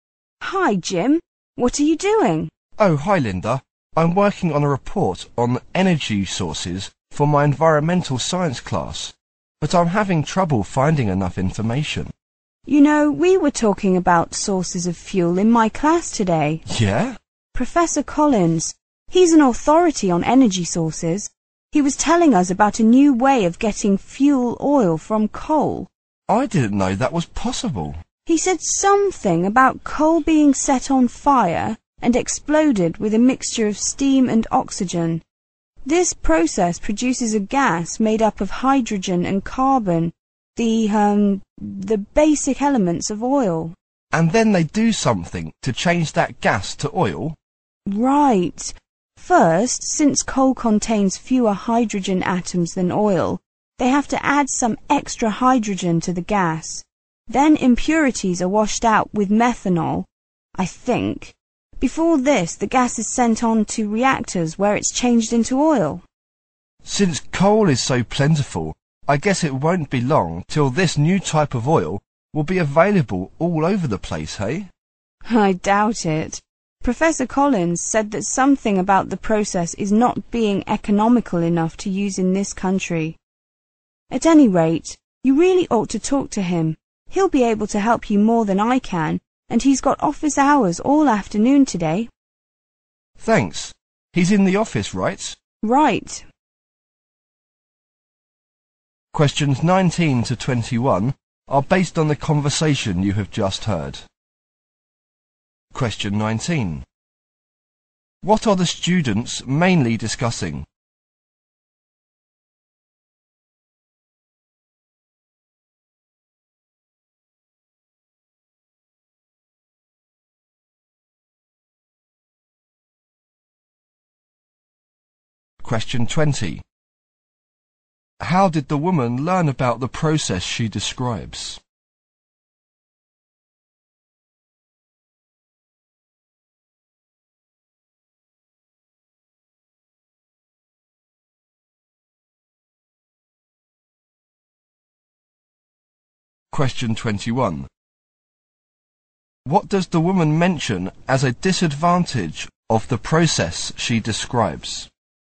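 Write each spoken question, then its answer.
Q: What are the students mainly discussing?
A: A new way of getting fuel oil from coal

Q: How did the woman learn about the process she describes?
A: From Professor Collins in her class

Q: What does the woman mention as a disadvantage of the process she describes?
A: It is not economical enough to use in this country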